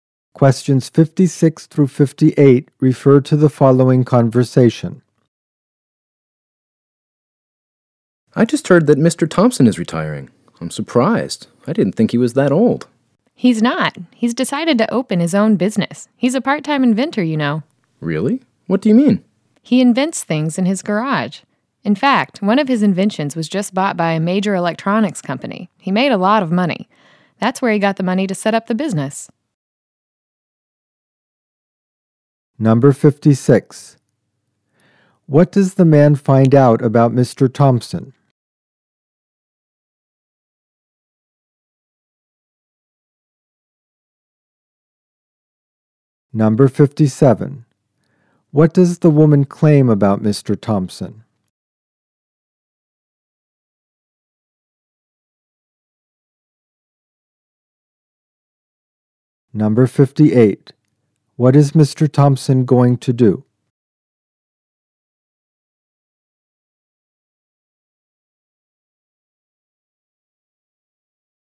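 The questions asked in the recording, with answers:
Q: Thompson? Number 58. What is Mr. Thompson going to do?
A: Open his own business.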